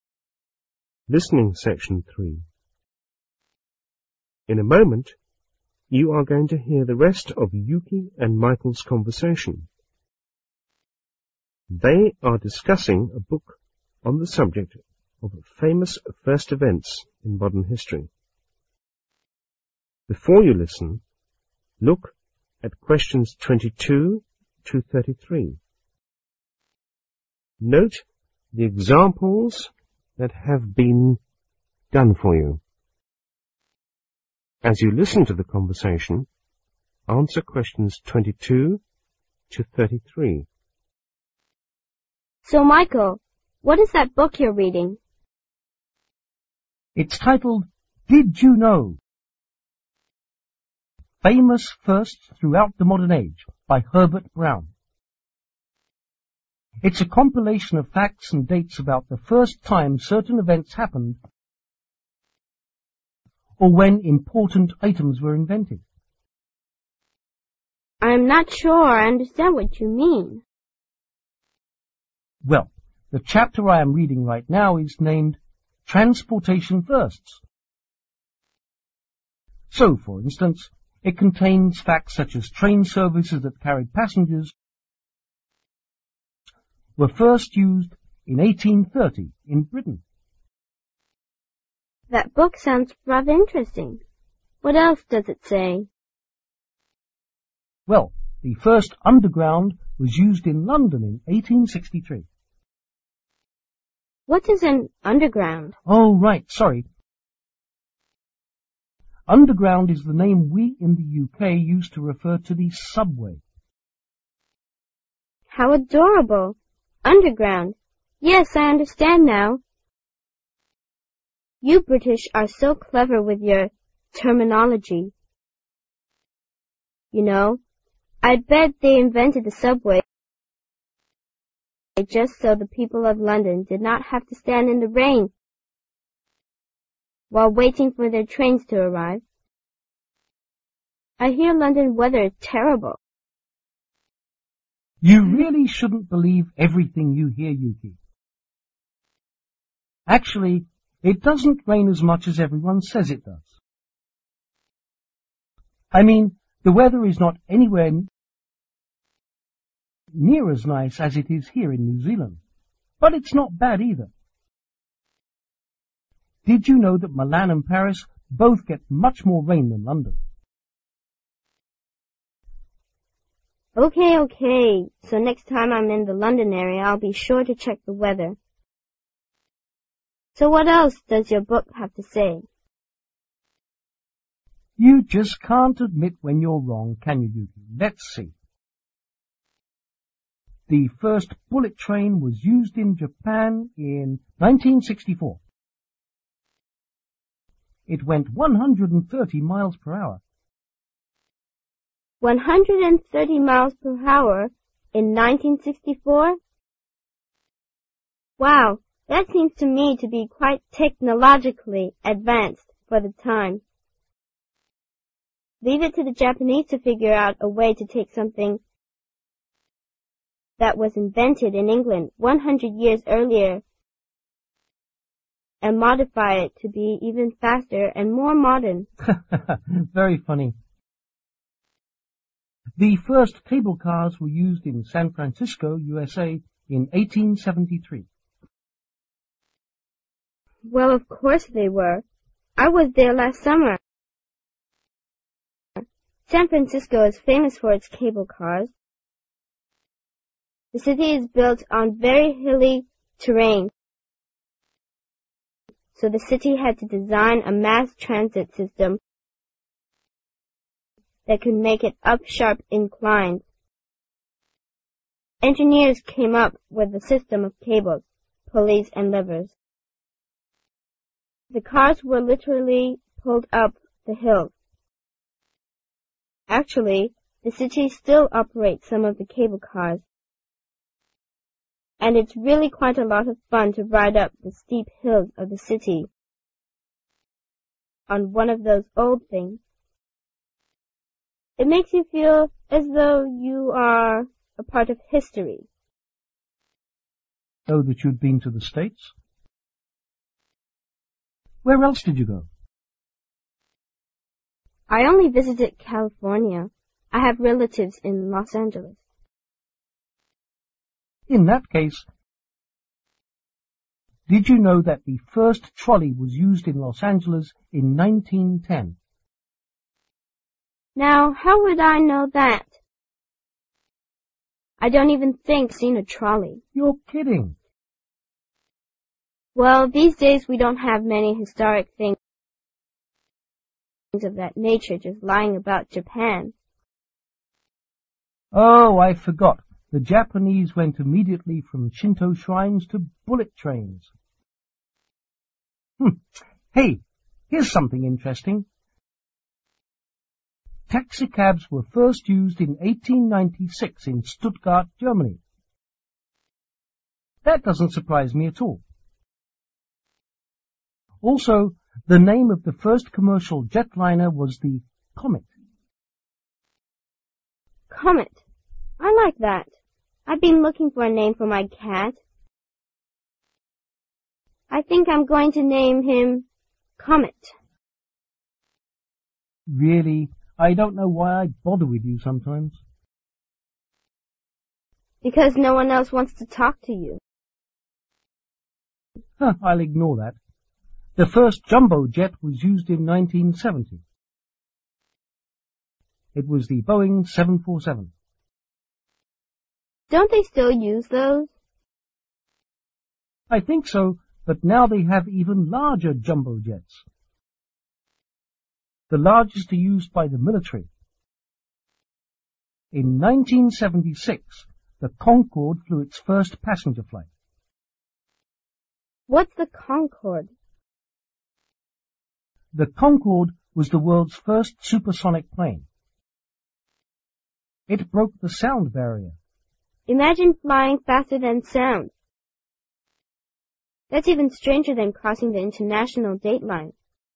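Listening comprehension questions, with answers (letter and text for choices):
Write no more than three words for each answer.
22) The'Underground' is the British term for ( ).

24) The Comet was ( )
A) the name of the first taxicab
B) the name of the first commercial jet liner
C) the name of Yuki's cat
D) the last name of the inventor of the first aeroplane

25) The first ( ) was introduced in 1970,by the Boeing company.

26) The Concord is able to fly ( ).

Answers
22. the subway
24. B) the name of the first commercial jet liner
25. jumbo jet
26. faster than sound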